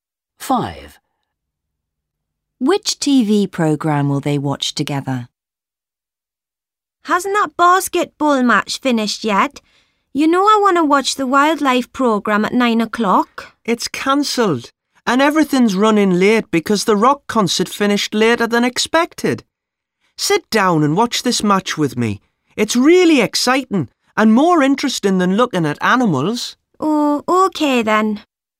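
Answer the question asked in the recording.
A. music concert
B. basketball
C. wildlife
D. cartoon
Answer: B. basketball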